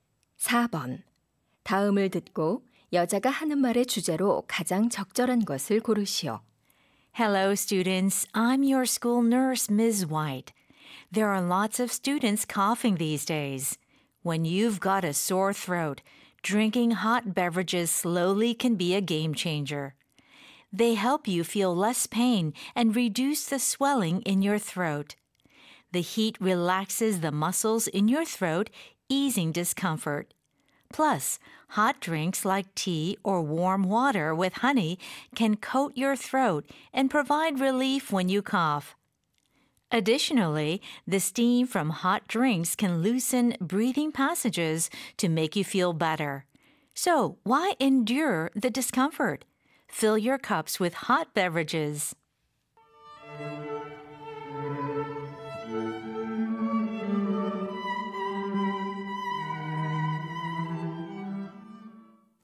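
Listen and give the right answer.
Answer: 목이 아플 때 뜨거운 음료를 천천히 마시는 것의 이점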